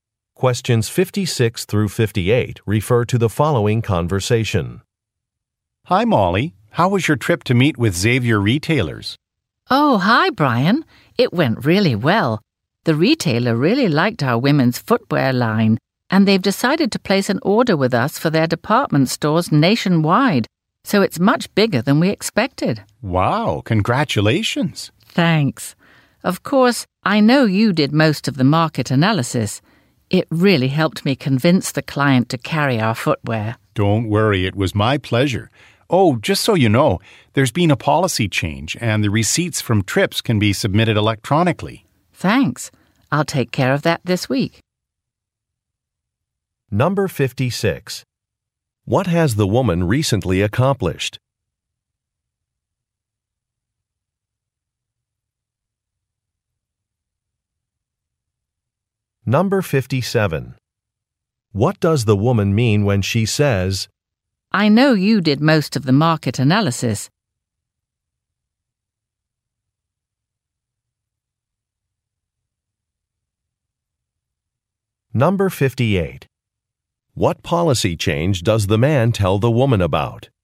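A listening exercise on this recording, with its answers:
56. What has the woman recently accomplished?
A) She designed a new line of shoes.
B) She founded an organization.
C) She advanced to an executive position.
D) She secured a large order from a client.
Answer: She secured a large order from a client.

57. What does the woman mean when she says, "I know you did most of the market analysis"?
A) She looks forward to reading a report.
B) She wants to take on a new task.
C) She is thankful for the man's help.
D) She needs some advice from the man.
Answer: She is thankful for the man's help.

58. What policy change does the man tell the woman about?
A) How to book flights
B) How to submit receipts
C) How to enter data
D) How to pay vendors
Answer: How to submit receipts

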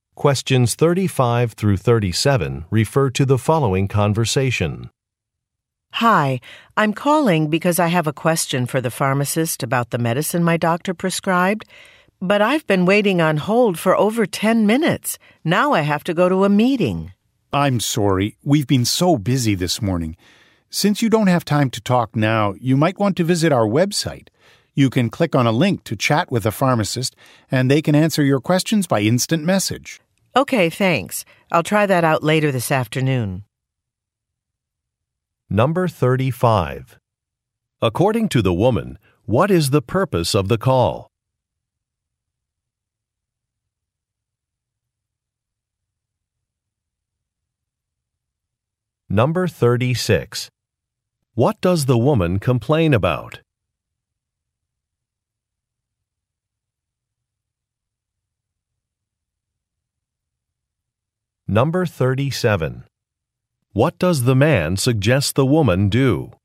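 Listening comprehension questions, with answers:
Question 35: According to the woman, what is the purpose of the call?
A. To find out some hours of operation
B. To schedule a doctor's appointment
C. To ask about a discount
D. To get information about some medicine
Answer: To get information about some medicine

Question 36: What does the woman complain about?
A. A long wait time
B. An unfriendly staff member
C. An incorrect order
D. A price increase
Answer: A long wait time

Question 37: What does the man suggest the woman do?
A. Leave a voice-mail message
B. Use an online chat service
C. Provide medical records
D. Cancel a payment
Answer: Use an online chat service

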